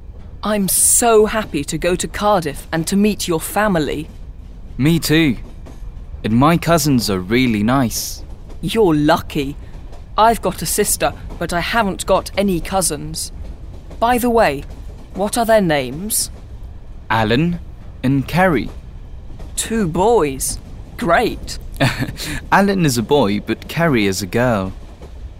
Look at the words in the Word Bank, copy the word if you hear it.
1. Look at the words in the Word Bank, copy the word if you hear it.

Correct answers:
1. happy, family, cousins, sister, Alan, Ceri, boys, boy, girl

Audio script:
Will: I'm so happy to go to Cardiff and to meet your family.
Steve: Me too. And my cousins are really nice.
Will: You're lucky. I've got a sister but I haven't got any cousins. By the way, what are their names?